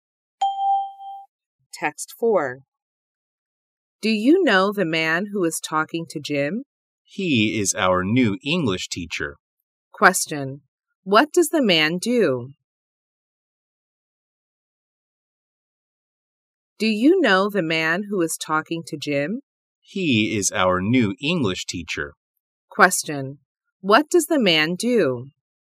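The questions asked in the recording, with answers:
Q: What does the man do?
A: He is an English teacher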